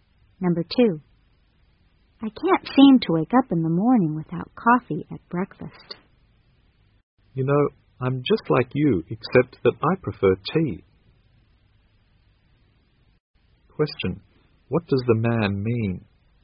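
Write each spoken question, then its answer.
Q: what does the man mean?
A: He also needs a drink to wake up in the morning, but he prefers tea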